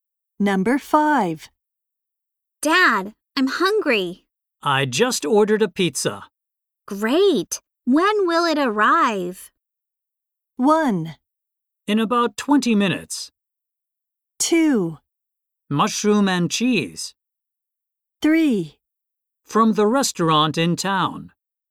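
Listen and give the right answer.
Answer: 1: In about 20 minutes.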